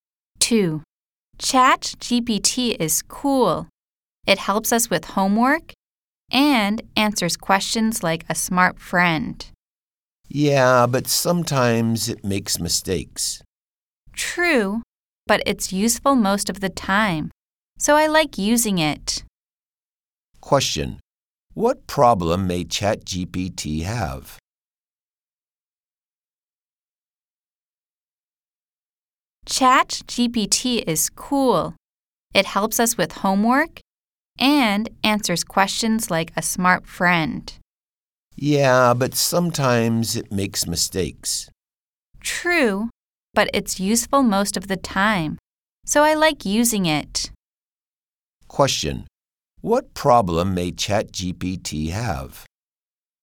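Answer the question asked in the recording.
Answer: It sometimes makes mistakes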